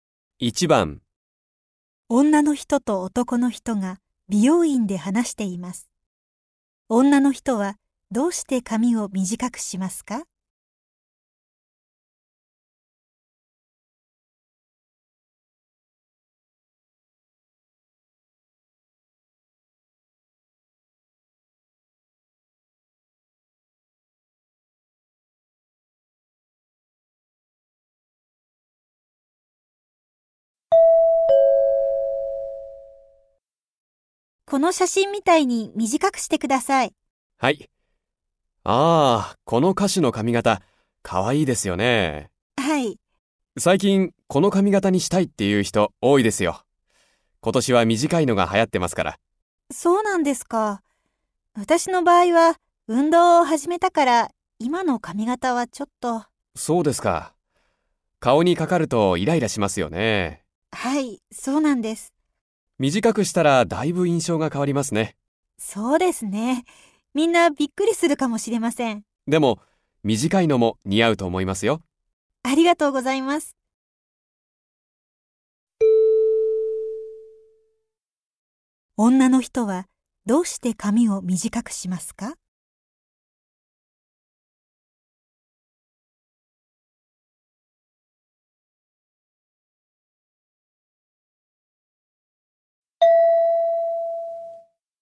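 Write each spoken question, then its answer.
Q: 女の人はどうして髪を短くしますか?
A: 運動を始めたから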